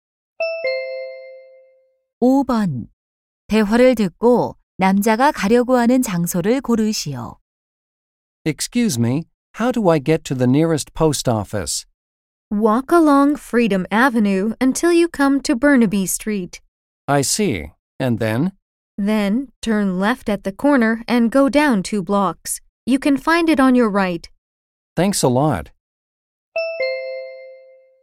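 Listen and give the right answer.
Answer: 우체국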